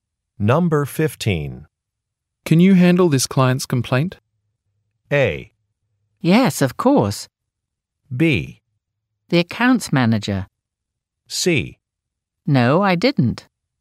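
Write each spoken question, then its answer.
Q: Can you handle this client's complaint?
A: A: Yes, of course.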